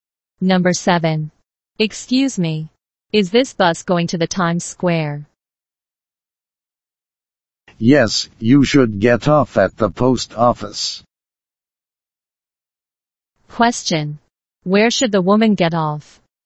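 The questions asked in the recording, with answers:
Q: Where should the woman get off?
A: At the post office.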